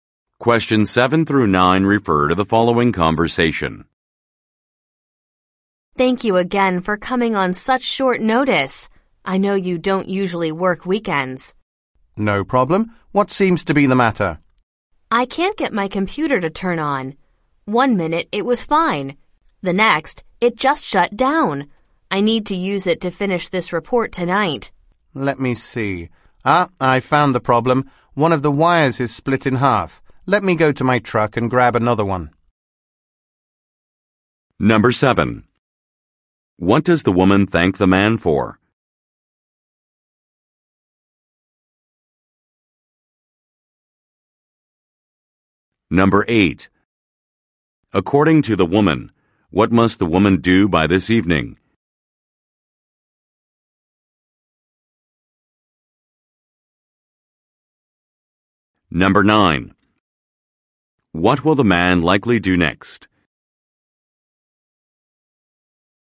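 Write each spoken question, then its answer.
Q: What does the woman thank the man for?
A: Coming on such short notice.

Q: According to the woman, what must the woman do by this evening?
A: Finish a report.

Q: What will the man likely do next?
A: Go to his truck to get another wire.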